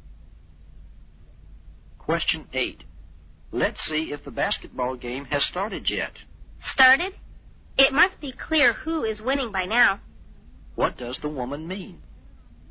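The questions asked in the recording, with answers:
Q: What does the woman mean?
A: The game started long ago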